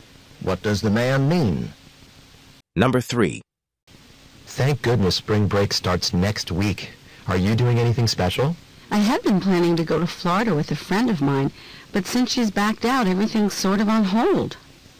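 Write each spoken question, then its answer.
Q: What does the woman mean?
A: Her plans for spring break are uncertain because her friend backed out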